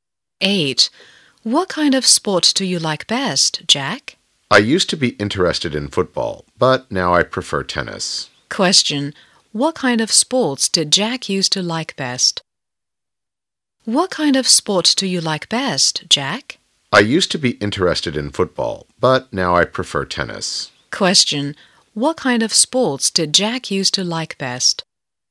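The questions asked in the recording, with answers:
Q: What kind of sports did Jack used to like best?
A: Football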